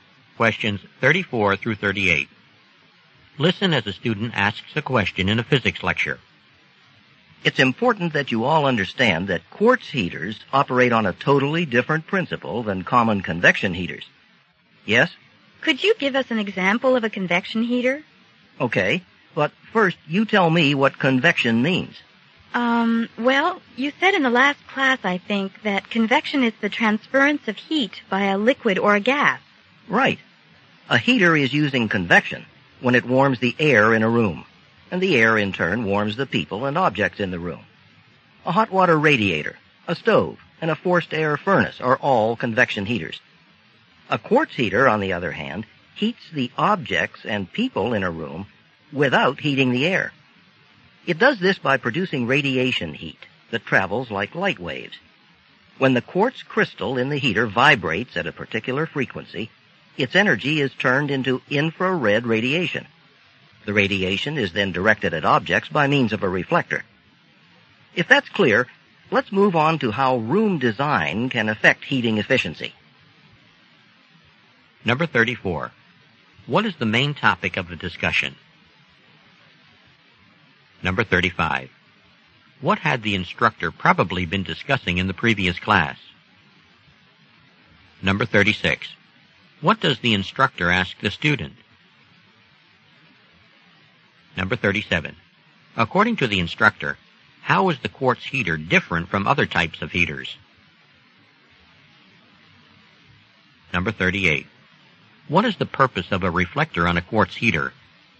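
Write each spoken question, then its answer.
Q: What is the main topic of the discussion?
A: How quartz heaters differ from convection heaters

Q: What had the instructor probably been discussing in the previous class?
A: Convection

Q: What does the instructor ask the student?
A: What convection means

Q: According to the instructor, how is the quartz heater different from other types of heaters?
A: It heats people and objects without heating the air

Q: What is the purpose of a reflector on a quartz heater?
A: To direct the radiation at objects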